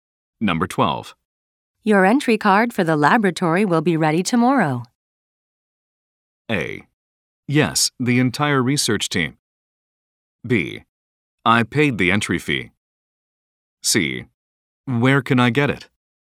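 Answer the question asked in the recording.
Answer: C: Where can I get it?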